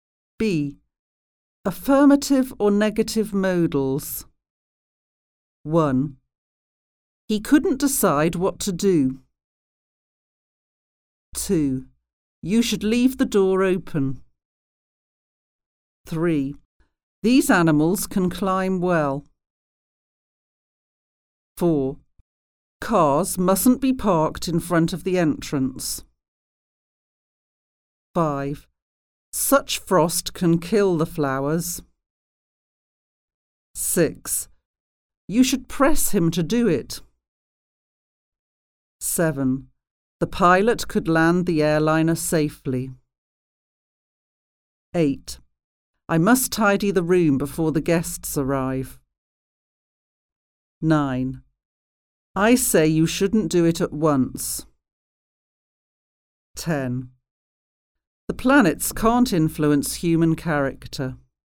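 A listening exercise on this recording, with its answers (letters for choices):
Affirmative or Negative Modals?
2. He (could/couldn't) decide what to do.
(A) could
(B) couldn't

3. You (should/shouldn't) leave the door open.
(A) should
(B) shouldn't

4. These animals (can/can't) climb well.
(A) can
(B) can't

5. Cars (must/mustn't) be parked in front of the entrance.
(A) must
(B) mustn't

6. Such frost (can/can't) kill the flowers.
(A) can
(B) can't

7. You (should/shouldn't) press him to do it.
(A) should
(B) shouldn't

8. The pilot (could/couldn't) land the airliner safely.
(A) could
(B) couldn't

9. I (must/mustn't) tidy the room before the guests arrive.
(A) must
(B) mustn't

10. I say you (should/shouldn't) do it at once.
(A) should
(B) shouldn't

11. The planets (can/can't) influence human character.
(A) can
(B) can't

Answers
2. B
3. A
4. A
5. B
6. A
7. A
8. A
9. A
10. B
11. B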